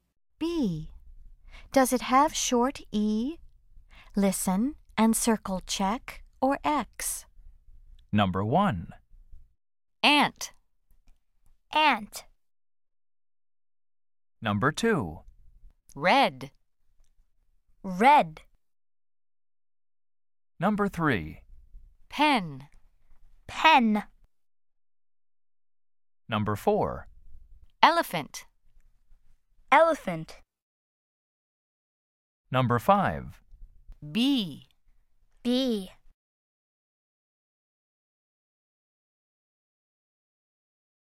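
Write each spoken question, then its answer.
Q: Does it have short E?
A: No (ant)

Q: Does it have short E?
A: Yes (red)

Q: Does it have short E?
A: Yes (pen)

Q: Does it have short E?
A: Yes (elephant)

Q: Does it have short E?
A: No (bee)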